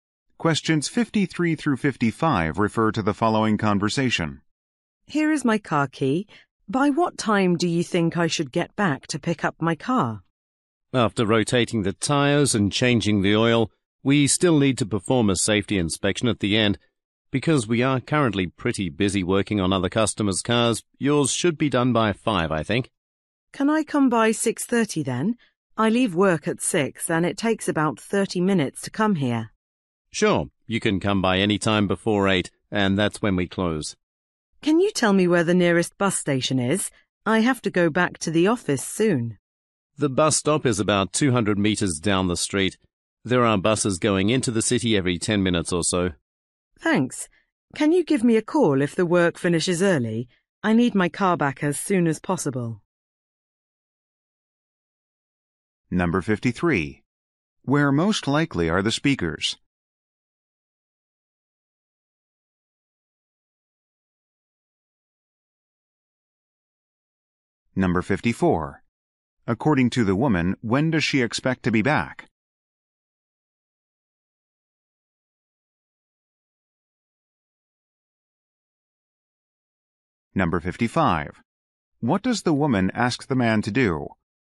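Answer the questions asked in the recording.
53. At a car repair shop
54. By 6:30
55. Call her if the work finishes early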